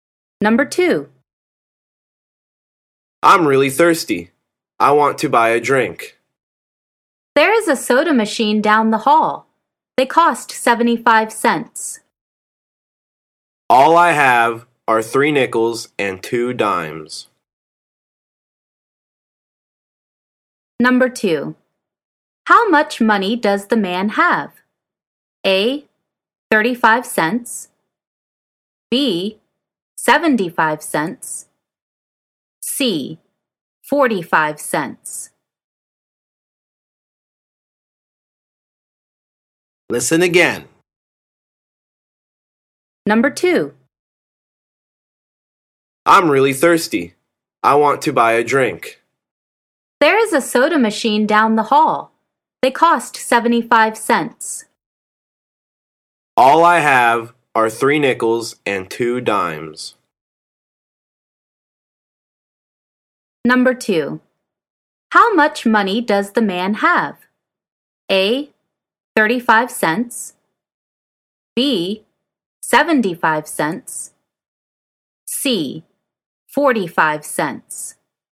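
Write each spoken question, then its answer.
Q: How much money does the man have?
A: A: 35 cents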